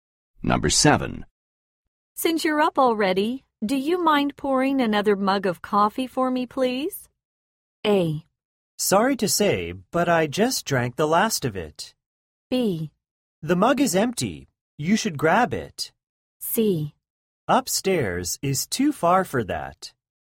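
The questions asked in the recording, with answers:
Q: Since you're up already, do you mind pouring another mug of coffee for me, please?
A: A: Sorry to say, but I just drank the last of it.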